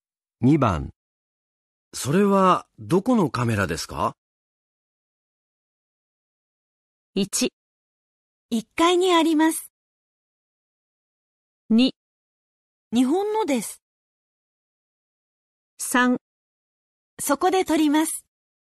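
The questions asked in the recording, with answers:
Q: それはどこのカメラですか?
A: 2: 日本のです。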